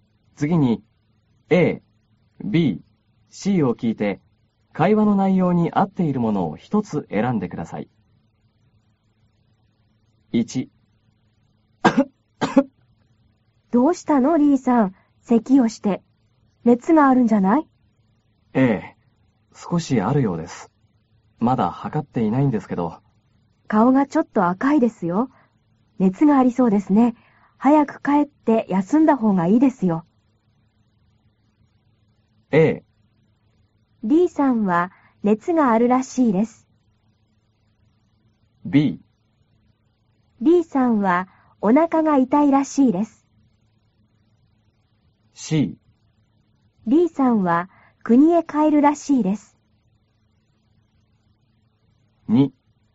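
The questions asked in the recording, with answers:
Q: A、B、C を聞いて会話の内容に合っているものを一つ選んでください。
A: A: D さんは熱があるらしいです。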